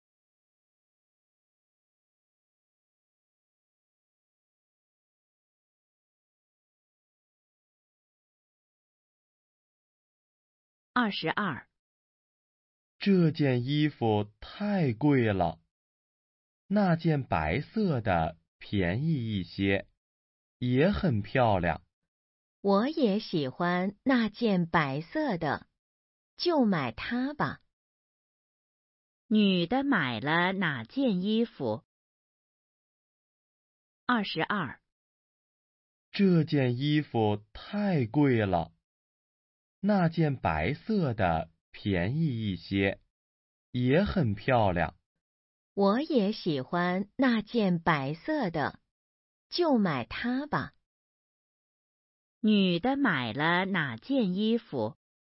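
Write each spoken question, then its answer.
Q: 女的买了哪件衣服?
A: 那件白色的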